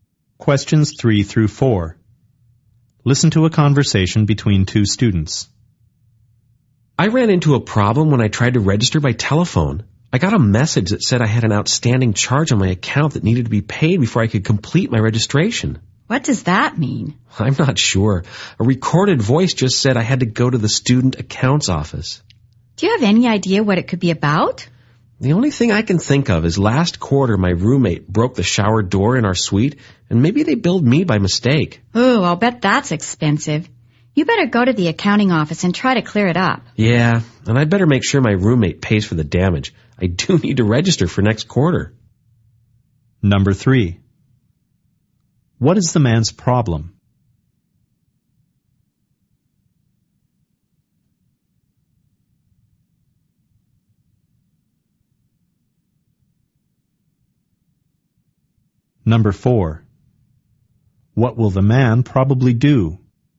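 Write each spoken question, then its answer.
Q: What is the man's problem?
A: He can't register because of an outstanding charge on his account

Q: What will the man probably do?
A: Go to the student accounts office to clear up the charge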